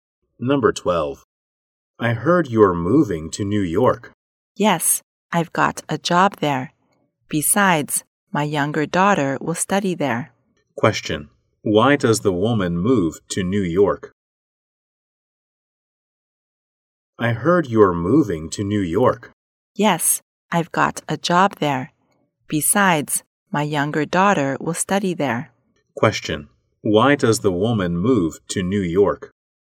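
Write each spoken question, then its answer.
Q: Why does the woman move to New York?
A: She got a job there (and her younger daughter will study there)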